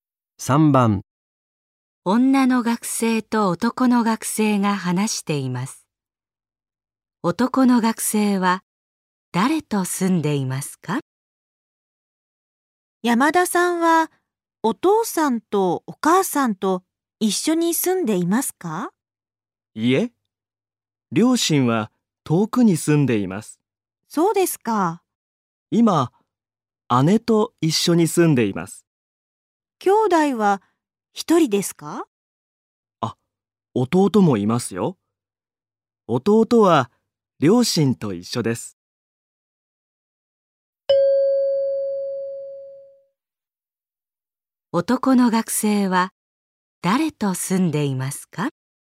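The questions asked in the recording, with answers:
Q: 男の学生は誰と住んでいますか?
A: お姉さん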